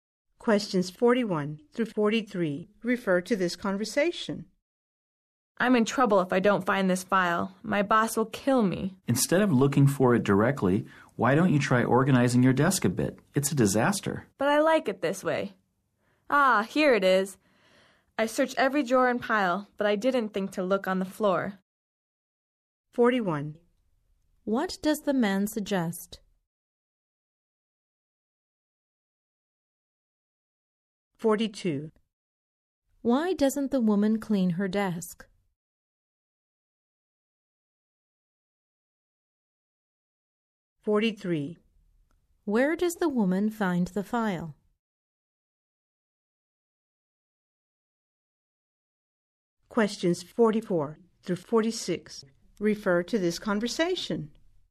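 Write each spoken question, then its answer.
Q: What does the man suggest?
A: Organizing her desk

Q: Why doesn't the woman clean her desk?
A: She likes it that way

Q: Where does the woman find the file?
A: On the floor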